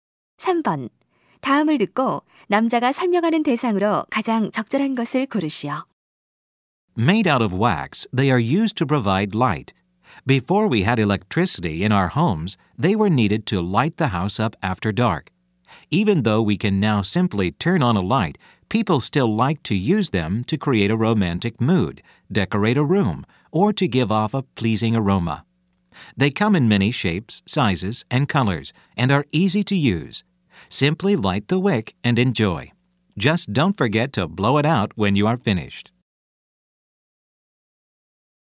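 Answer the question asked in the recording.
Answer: 양초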